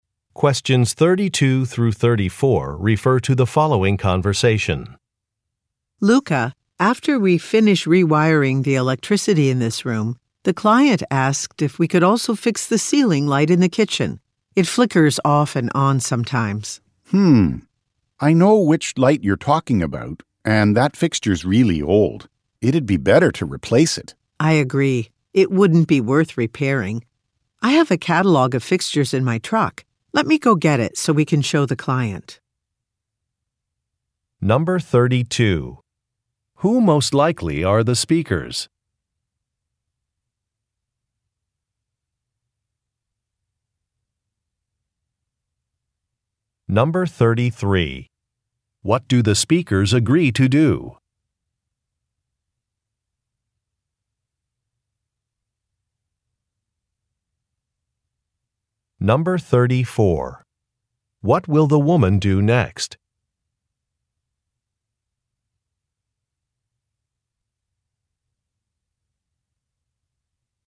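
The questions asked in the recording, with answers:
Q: Who most likely are the speakers?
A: Electricians

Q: What do the speakers agree to do?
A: Replace the kitchen ceiling light fixture

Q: What will the woman do next?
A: Get a catalog of fixtures from her truck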